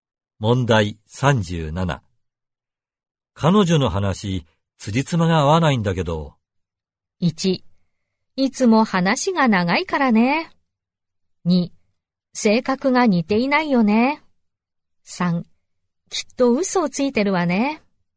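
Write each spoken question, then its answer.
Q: 彼女の話、辻褄が合わないんだけど。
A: 3: きっと嘘をついてるわね。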